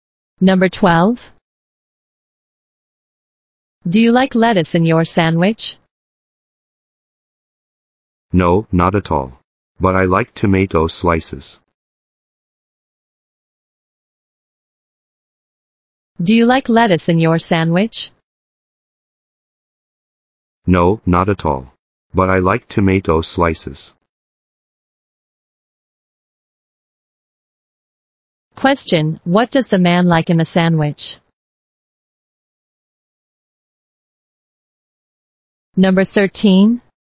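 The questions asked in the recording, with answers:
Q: what does the man like in the sandwich?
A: Tomato slices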